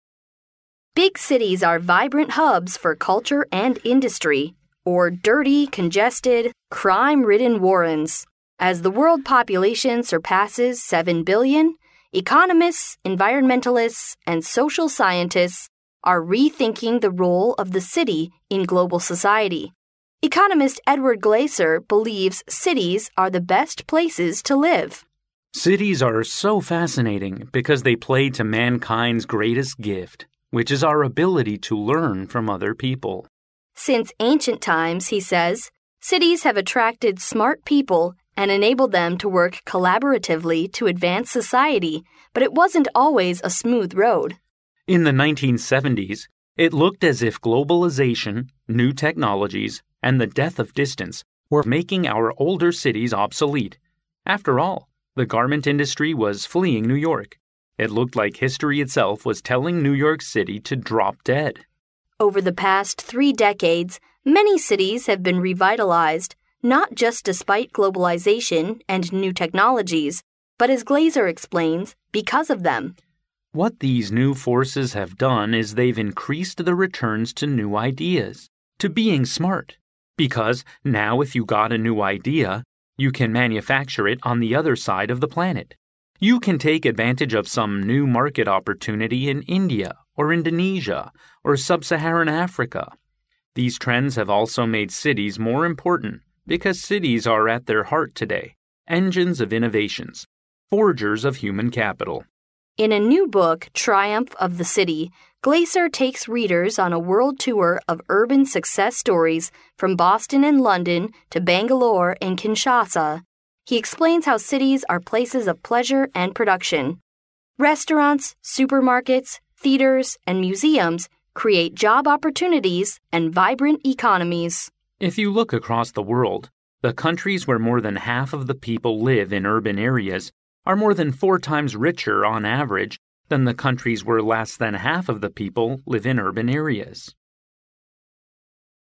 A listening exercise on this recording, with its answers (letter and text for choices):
Listen to the conversation. Then read the four choices marked A, B, C and D, and decide which is the best answer according to what you hear.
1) What is Glaeser's opinion towards cities? ______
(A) It is very dirty and no longer good to live in cities.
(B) They are too crowded with exploded population.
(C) Cities are extraordinary in creating opportunities.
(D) We need to save the industry and garments in cities.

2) What did globalization bring to older cities, such as New York, in 1970s? ______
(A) New technologies and prosperity.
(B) The rising of garment industry.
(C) Reductions in population.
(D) A severe depression.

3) What is the current role of cities in the world? ______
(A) Cities are more and more important.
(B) They are less important than before.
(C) People believe cities are always the heart of manufacturing.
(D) There are advantages in cities in market opportunities.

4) What is the main focus of Glaeser's book Triumph of the City? ______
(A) Techniques of looking for jobs in cities.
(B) His legend in travelling around the world.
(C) Pleasure and prospects of living in cities.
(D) Comparisons between living in cities and countryside.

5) According to Glaeser, what is the advantage of countries with more than half population living in urban areas comparing to those with less than half population living in urban areas? ______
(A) Less happier.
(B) Much richer.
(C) More relaxed.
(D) Very depressed.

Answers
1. (C) Cities are extraordinary in creating opportunities.
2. (D) A severe depression.
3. (A) Cities are more and more important.
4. (C) Pleasure and prospects of living in cities.
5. (B) Much richer.

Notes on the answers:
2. 由录音中"It looked like history itself was telling New York City to drop dead"可知,全球化使得像纽约这样的老城面临着衰败。因此选D项。
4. 根据录音中Faiza的话可知,"Triumph of the City"向人们介绍了城市是快乐和生产物质的地方。因此选C项。
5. 录音中最后指出,城镇化程度高的国家比城镇化程度低的国家更富裕。因此选B项。

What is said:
[听力原文] Faiza: Big cities are vibrant hubs for culture and industry, or dirty, congested, crime-ridden warrens. As the world population surpasses seven billion, economists, environmentalists and social scientists are rethinking the role of the city in global society. Economist Edward Glaeser believes cities are the best places to live. Glaeser: Cities are so fascinating because they play to mankind's greatest gift, which is our ability to learn from other people. Faiza: Since ancient times, he says, cities have attracted smart people and enabled them to work collaboratively to advance society. But it wasn't always a smooth road. Glaeser: In the 1970s, it looked as if globalization, new technologies and the death of distance were making our older cities obsolete. After all, the garment industry was fleeing New York. It looked like history itself was telling New York City to drop dead. Faiza: Over the past three decades many cities have been revitalized, not just despite globalization and new technologies, but, as Glaeser explains, because of them. Glaeser: What these new forces have done is they've increased the returns to new ideas, to being smart. Because, now if you got a new idea, you can manufacture it on the other side of the planet. You can take advantage of some new market opportunity in India or Indonesia or Sub-Saharan Africa. These trends have also made cities more important because cities are at their heart today, engines of innovations, forgers of human capital. Faiza: In a new book, "Triumph of the City," Glaeser takes readers on a world tour of urban success stories from Boston and London, to Bangalore and Kinshasa. He explains how cities are places of pleasure and production. Restaurants, supermarkets, theaters and museums create job opportunities and vibrant economies. Glaeser: If you look across the world, the countries where more than half of the people live in urban areas are more than four times richer, on average, than the countries where less than half of the people live in urban areas.